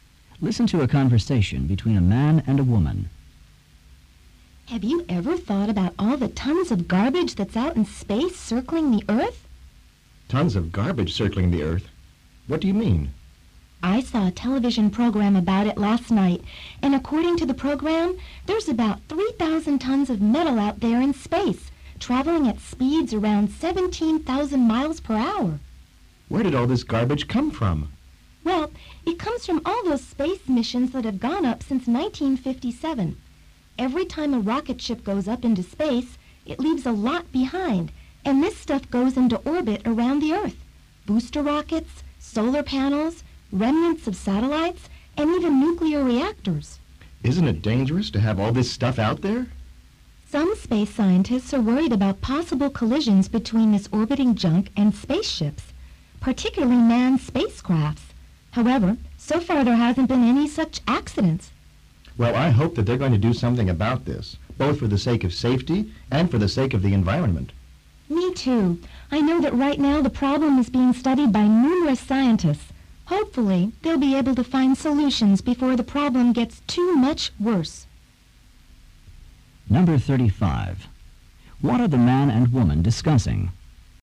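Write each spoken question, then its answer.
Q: What are the man and woman discussing?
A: Garbage (space junk) orbiting the Earth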